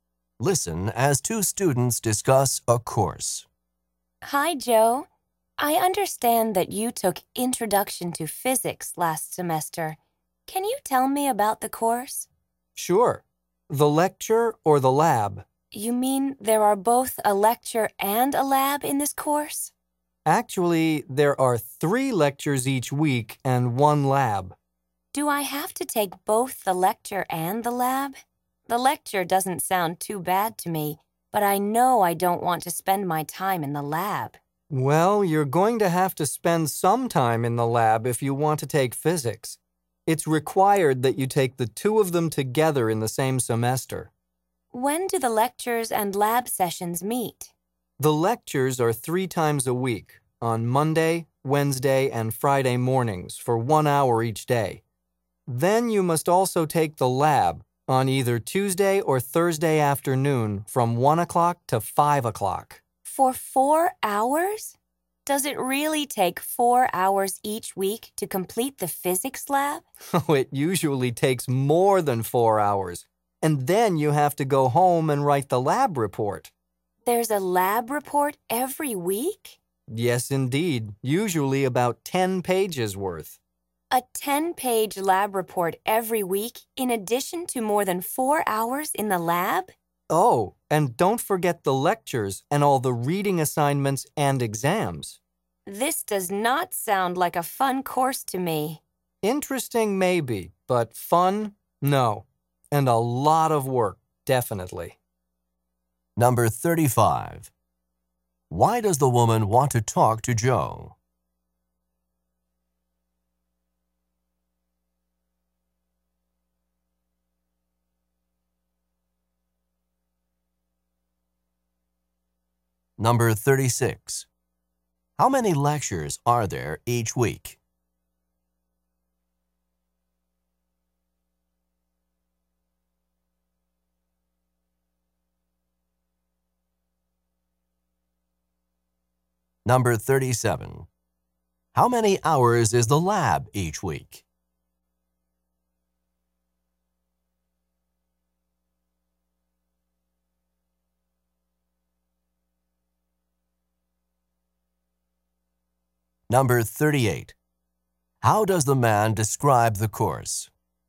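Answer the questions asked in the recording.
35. To get information about the Introduction to Physics course
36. Three
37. Four hours (usually more)
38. Interesting maybe, but not fun, and a lot of work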